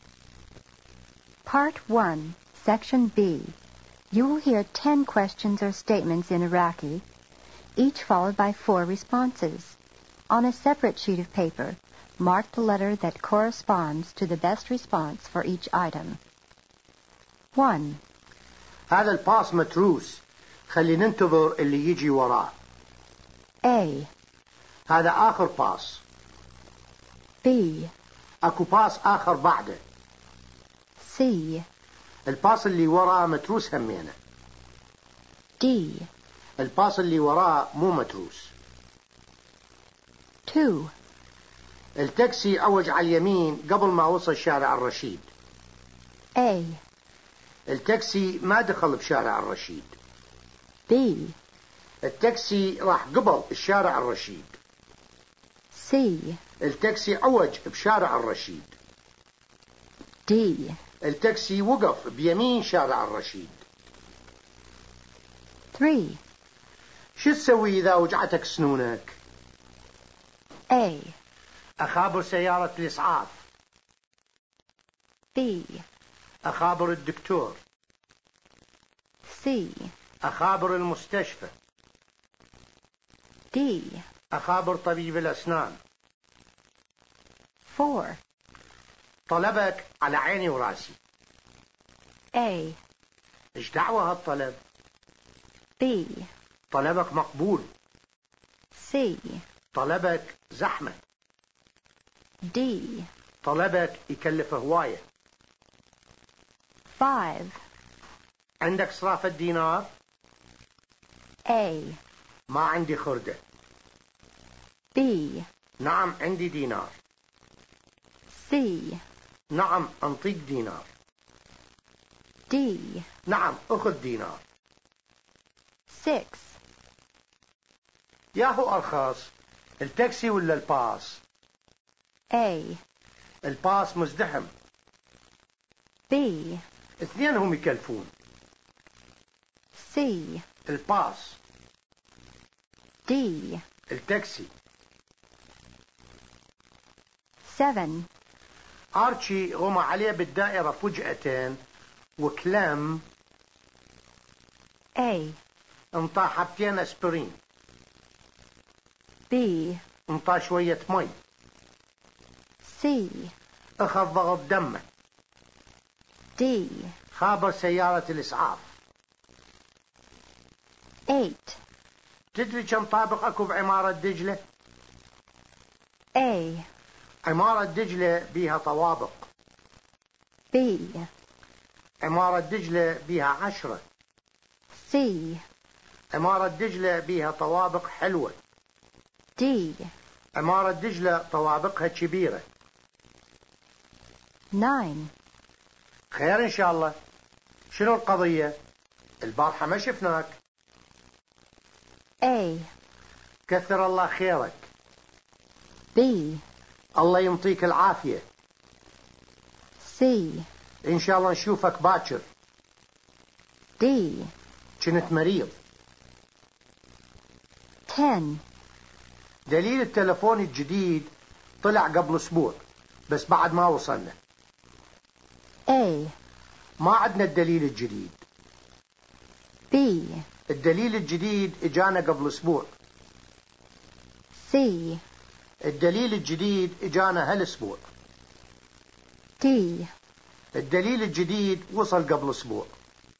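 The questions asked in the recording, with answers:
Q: شو تسوي إذا وجعتك سنونك؟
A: D: أخابر طبيب الأسنان.

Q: طلبك على عيني وراسي.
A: B: طلبك مقبول.

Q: ياهو أرخص، التاكسي ولا الباص؟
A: C: الباص.

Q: تدري كم طابق أكو بعمارة دجلة؟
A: B: عمارة دجلة بيها 10.

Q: خير إن شاء الله. شنو القضية؟ البارحة ما شفناك.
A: D: كنت مريض.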